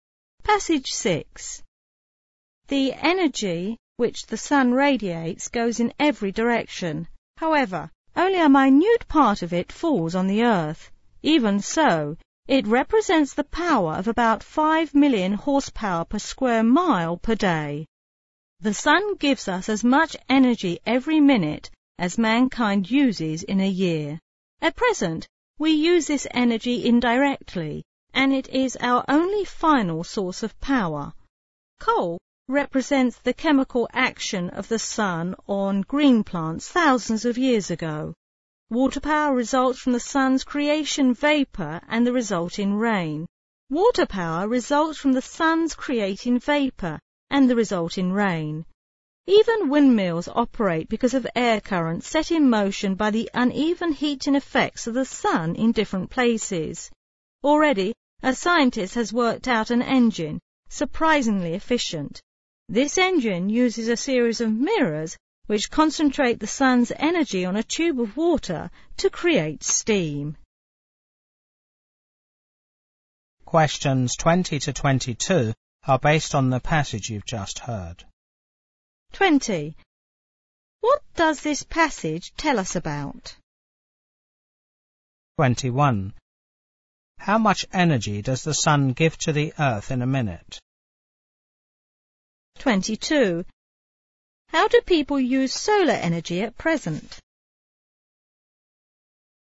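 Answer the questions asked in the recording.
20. The sun's energy as our source of power
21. As much as mankind uses in a year
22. Indirectly, e.g. through coal, water power and wind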